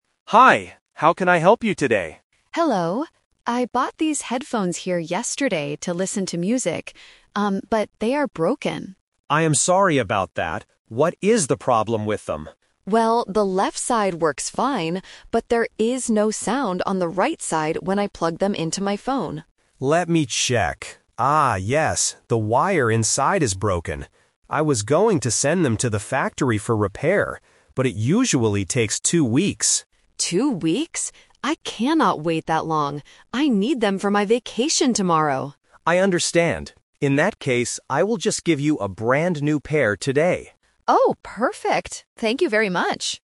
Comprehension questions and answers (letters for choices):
Listen to the conversation between a customer and a store clerk. Choose the correct answer (A, B, or C) for each question.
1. What is the problem with the customer's headphones?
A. They do not fit her phone.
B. Only one side makes a sound.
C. Both sides have no sound.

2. What did the clerk plan to do at first?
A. Give the customer her money back.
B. Give the customer a new pair of headphones.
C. Send the headphones away to be fixed.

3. Why does the customer refuse to wait for two weeks?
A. Because she is going on a trip tomorrow.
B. Because she wants to buy a different brand.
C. Because the factory is too far away.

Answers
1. B
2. C
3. A

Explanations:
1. The customer says clearly: "...the left side works fine, but there is no sound on the right side." Option (C) is a trap because the word "no sound" is mentioned, but it is only for the right side, not both. Option (A) is a plausible technical issue but is never mentioned.
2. The clerk states his initial plan: "I was going to send them to the factory for repair." ("repair" = "be fixed"). Option (B) is the A2 Twist/Trap; giving a new pair is his final decision, not his first plan. Option (A) is a logical customer service action but is not mentioned in the audio.
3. The customer explains her hurry: "I need them for my vacation tomorrow!" ("vacation" = "trip"). Option (C) is a trap because the "factory" is mentioned by the clerk, but the distance is not the reason she can't wait. Option (B) is an unmentioned distractor.

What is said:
Clerk: Hi, how can I help you today?
Customer: Hello. I bought these headphones here yesterday to listen to music. Um, but they are broken.
Clerk: I am sorry about that. What is the problem with them?
Customer: Well, the left side works fine, but there is no sound on the right side when I plug them into my phone.
Clerk: Let me check. Ah, yes, the wire inside is broken. I was going to send them to the factory for repair. But it usually takes two weeks.
I cannot wait that long. I need them for my vacation tomorrow!
Clerk: I understand. In that case, I will just give you a brand new pair today.